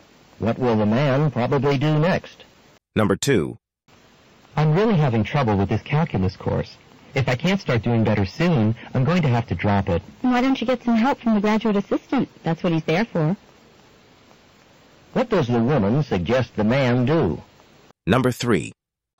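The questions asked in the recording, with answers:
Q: What does the woman suggest the man do?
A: Get help from the graduate assistant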